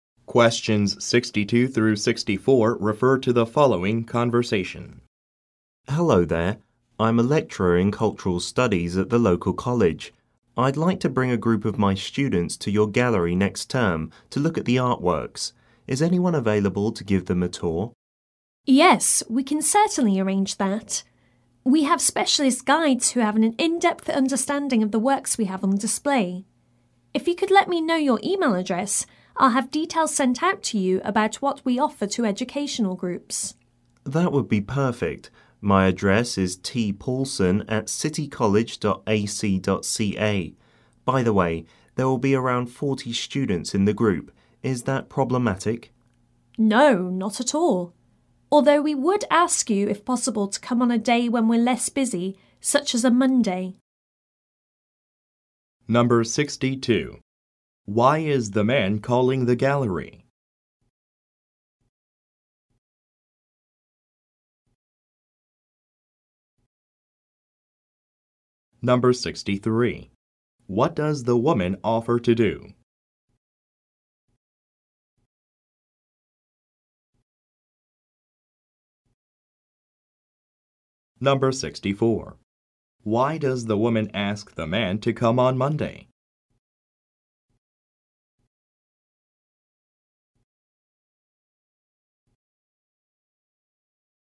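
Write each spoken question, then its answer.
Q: Why is the man calling the gallery?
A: To arrange a tour of the gallery for his students

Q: What does the woman offer to do?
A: Send him details by email about what they offer educational groups

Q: Why does the woman ask the man to come on Monday?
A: Because the gallery is less busy then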